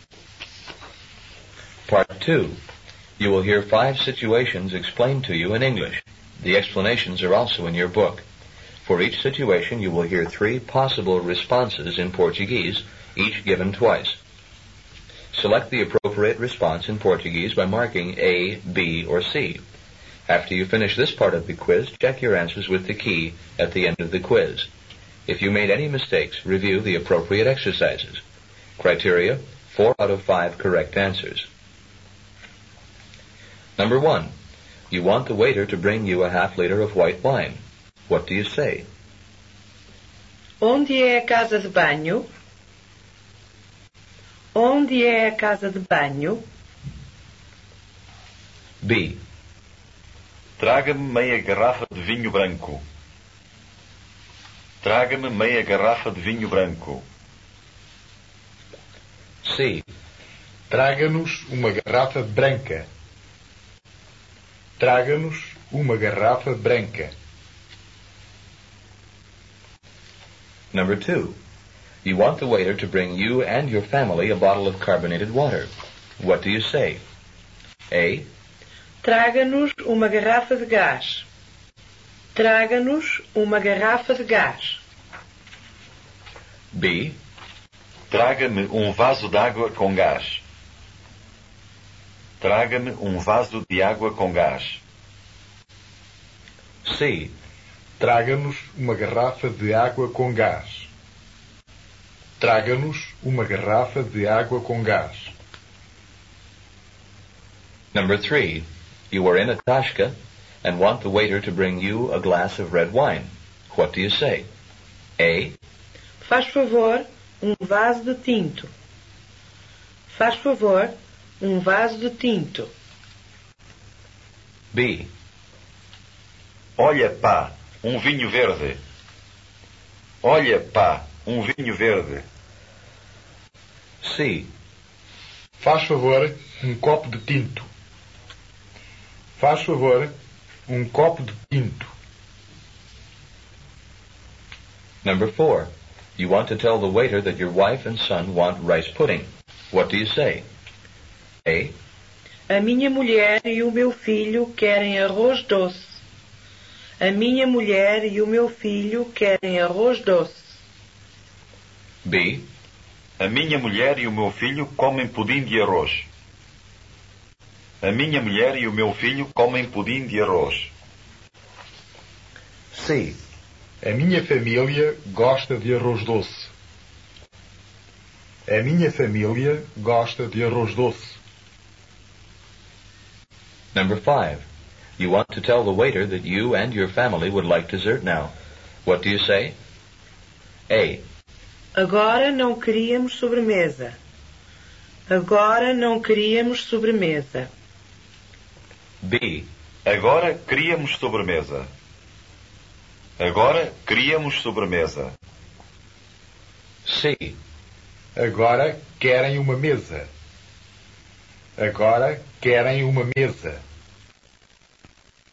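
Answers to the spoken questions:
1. B: Traga-me meia garrafa de vinho branco.
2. C: Traga-nos uma garrafa de água com gás.
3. C: Faz favor, copo de tinto.
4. A: A minha mulher e o meu filho querem arroz doce.
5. B: Agora queríamos sobremesa.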